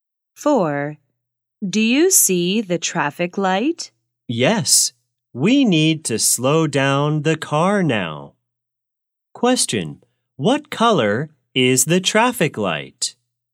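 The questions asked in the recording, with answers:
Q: What color is the traffic light?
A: Yellow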